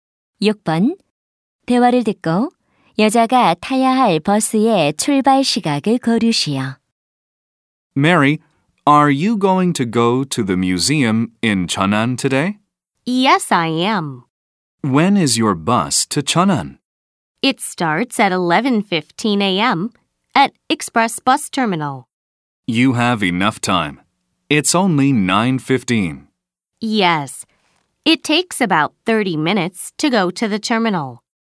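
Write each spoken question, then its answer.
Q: 대화를 듣고 여자가 타야 할 버스의 출발 시각을 고르시오.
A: 오전 11시 15분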